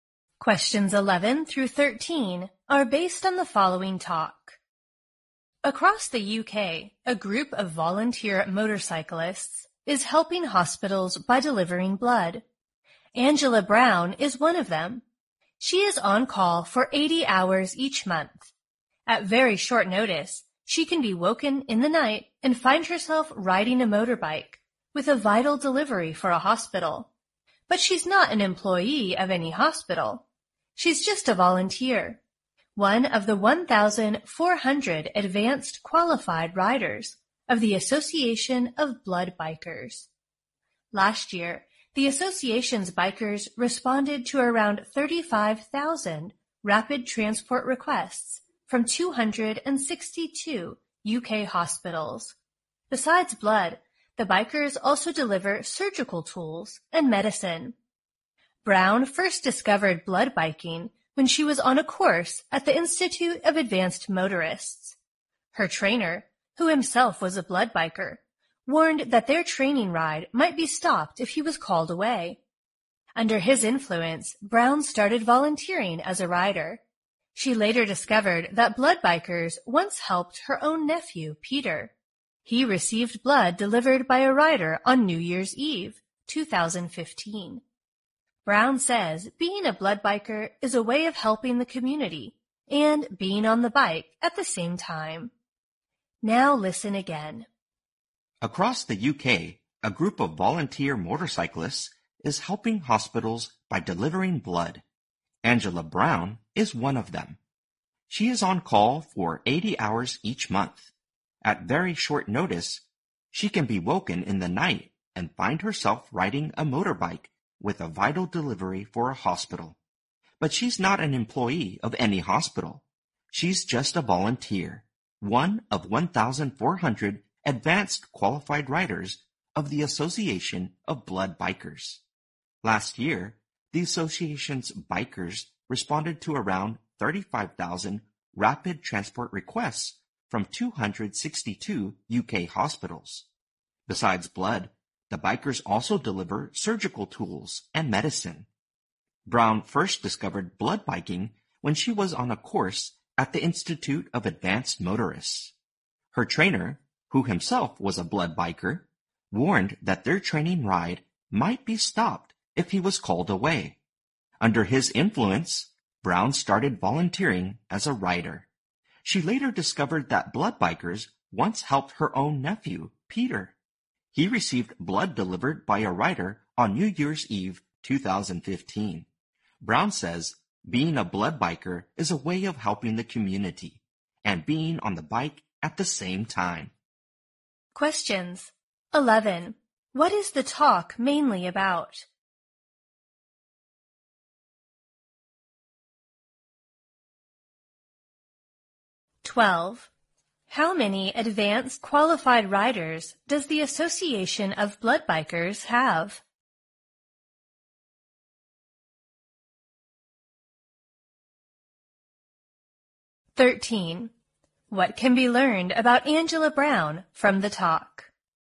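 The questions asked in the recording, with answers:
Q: What is the talk mainly about?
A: Volunteer motorcyclists delivering blood to hospitals

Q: How many advanced qualified riders does the Association of Blood Bikers have?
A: 1,400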